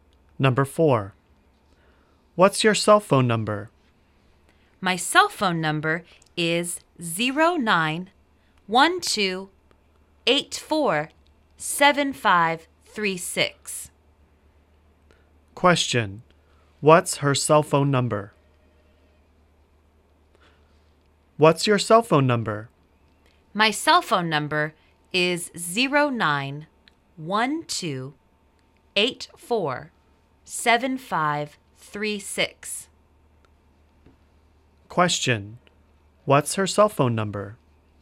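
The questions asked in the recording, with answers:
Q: What's her cell phone number?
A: 09-12-84-7536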